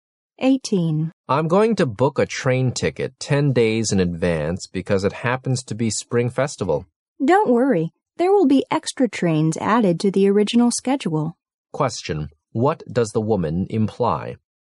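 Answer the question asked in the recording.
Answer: There is no need to book so early because extra trains will be added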